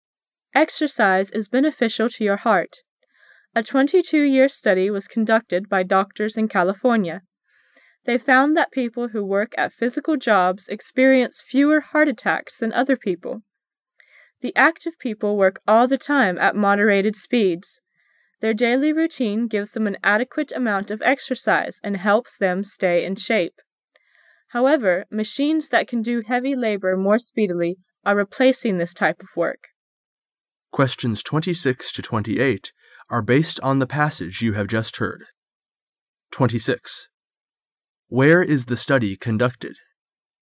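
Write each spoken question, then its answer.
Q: Where is the study conducted?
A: In California

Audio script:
[解析] 26-28 Exercise is beneficial to your heart. A 22 - year study was conducted by doctors in California. They found that people who work at physical jobs experience fewer heart attacks than other people. The active people work all the time at moderated speeds. Their daily rountine gives them an adequate amount of exercise and helps them stay in shape. However, machines that can do heavy labor more speedily are replacing this type of work.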